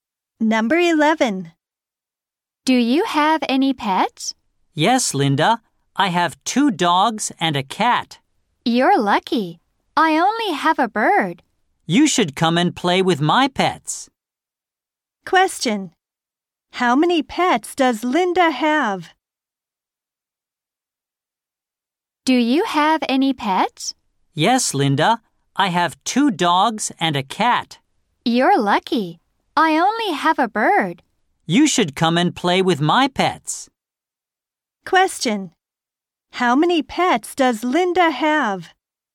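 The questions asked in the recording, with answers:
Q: How many pets does Linda have?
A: One (a bird)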